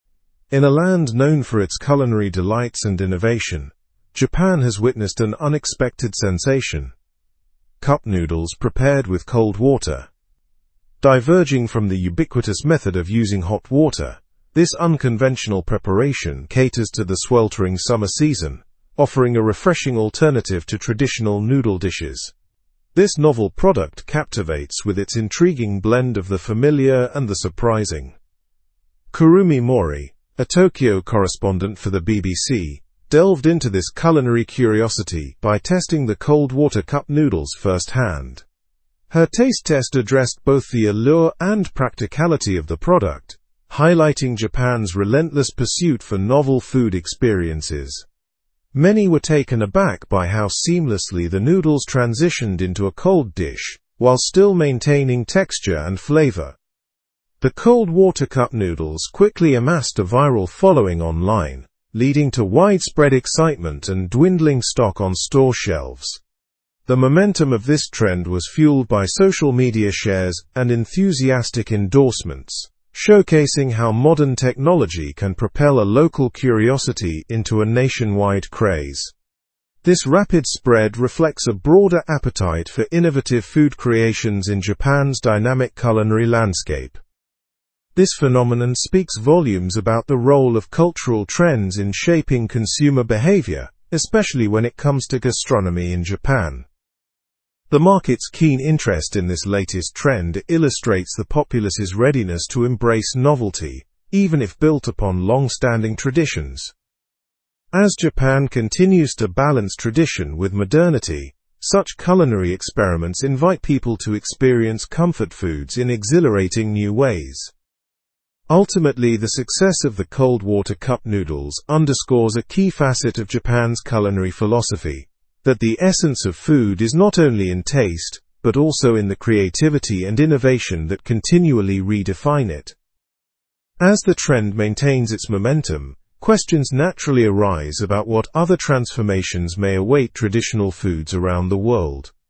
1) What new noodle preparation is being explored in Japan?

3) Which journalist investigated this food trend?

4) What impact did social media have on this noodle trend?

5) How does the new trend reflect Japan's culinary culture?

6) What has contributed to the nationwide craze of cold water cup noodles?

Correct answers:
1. Cup noodles prepared with cold water.
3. Kurumi Mori from the BBC.
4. It helped spread the trend, leading to viral popularity.
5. It highlights the balance between innovation and tradition.
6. Social media shares and enthusiastic endorsements.

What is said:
In a land known for its culinary delights and innovation, Japan has witnessed an unexpected sensation: cup noodles prepared with cold water. Diverging from the ubiquitous method of using hot water, this unconventional preparation caters to the sweltering summer season, offering a refreshing alternative to traditional noodle dishes. This novel product captivates with its intriguing blend of the familiar and the surprising.
Kurumi Mori, a Tokyo correspondent for the BBC, delved into this culinary curiosity by testing the cold water cup noodles firsthand. Her taste test addressed both the allure and practicality of the product, highlighting Japan's relentless pursuit for novel food experiences. Many were taken aback by how seamlessly the noodles transitioned into a cold dish while still maintaining texture and flavor.
The cold water cup noodles quickly amassed a viral following online, leading to widespread excitement and dwindling stock on store shelves. The momentum of this trend was fueled by social media shares and enthusiastic endorsements, showcasing how modern technology can propel a local curiosity into a nationwide craze. This rapid spread reflects a broader appetite for innovative food creations in Japan's dynamic culinary landscape.
This phenomenon speaks volumes about the role of cultural trends in shaping consumer behavior, especially when it comes to gastronomy in Japan. The market's keen interest in this latest trend illustrates the populace's readiness to embrace novelty, even if built upon long-standing traditions. As Japan continues to balance tradition with modernity, such culinary experiments invite people to experience comfort foods in exhilarating new ways.
Ultimately, the success of the cold water cup noodles underscores a key facet of Japan's culinary philosophy: that the essence of food is not only in taste but also in the creativity and innovation that continually redefine it.
of Japan's culinary philosophy: that the essence of food is not only in taste but also in the creativity and innovation that continually redefine it. As the trend maintains its ?, questions naturally arise about what other transformations may await ? foods around the world.

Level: Level 4